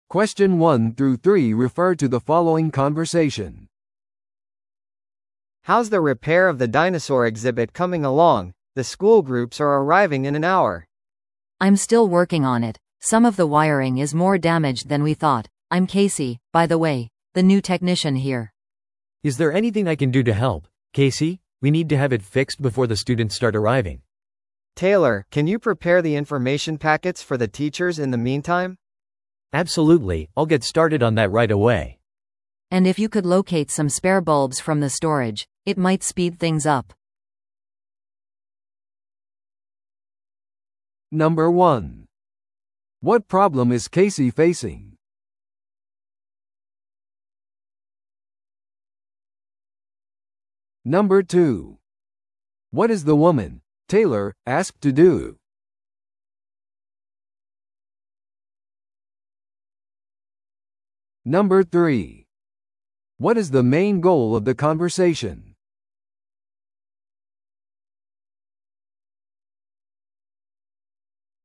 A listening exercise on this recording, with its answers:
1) What problem is Casey facing?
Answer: 予想以上に配線のダメージが大きい。

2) What is the woman, Taylor, asked to do?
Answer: 訪問する先生方のためにパックを用意する。

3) What is the main goal of the conversation?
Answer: 展示を時間通りに用意するためのタスクを割り振る。

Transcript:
A: How's the repair of the dinosaur exhibit coming along? The school groups are arriving in an hour.
B: I'm still working on it. Some of the wiring is more damaged than we thought. I'm Casey, by the way, the new technician here.
C: Is there anything I can do to help, Casey? We need to have it fixed before the students start arriving.
A: Taylor, can you prepare the information packets for the teachers in the meantime?
C: Absolutely, I'll get started on that right away.
B: And if you could locate some spare bulbs from the storage, it might speed things up.